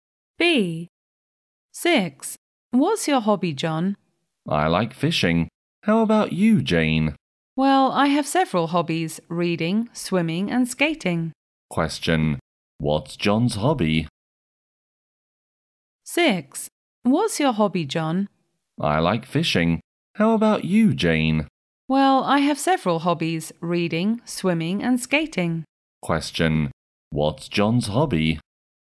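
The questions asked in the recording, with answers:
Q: What's John's hobby?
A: Fishing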